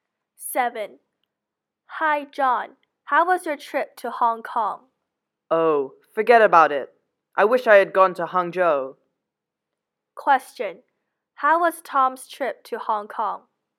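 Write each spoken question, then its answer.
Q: How was Tom's trip to Hong Kong?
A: It was disappointing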